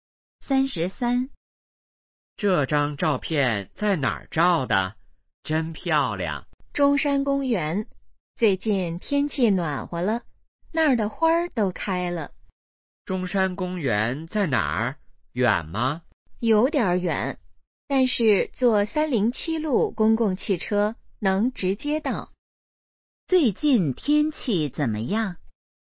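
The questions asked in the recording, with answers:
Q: 最近天气怎么样?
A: 暖和了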